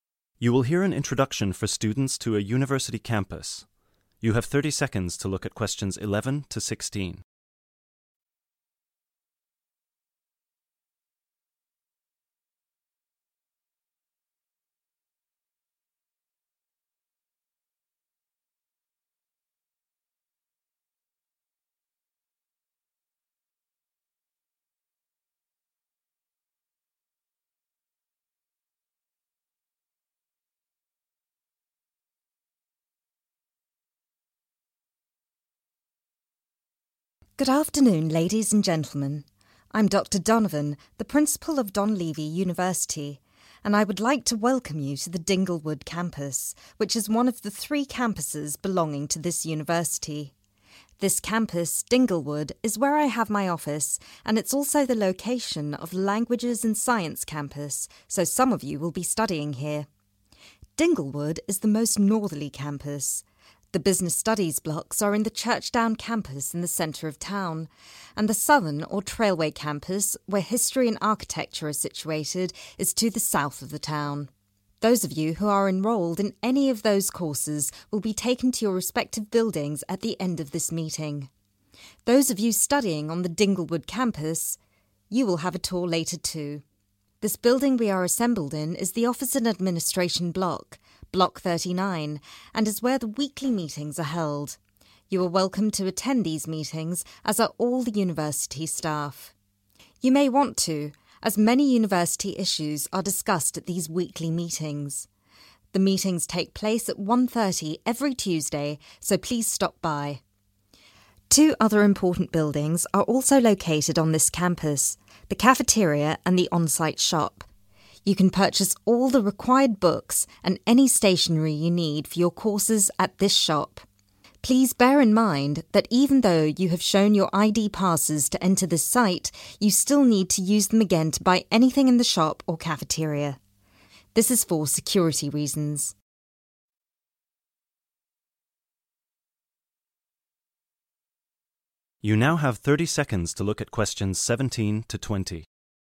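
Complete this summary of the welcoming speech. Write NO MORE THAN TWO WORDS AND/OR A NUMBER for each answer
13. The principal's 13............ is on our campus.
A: office

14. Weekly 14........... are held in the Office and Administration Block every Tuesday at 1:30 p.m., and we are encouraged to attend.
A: meetings

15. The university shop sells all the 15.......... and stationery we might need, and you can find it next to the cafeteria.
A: books

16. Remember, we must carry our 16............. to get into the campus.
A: ID passes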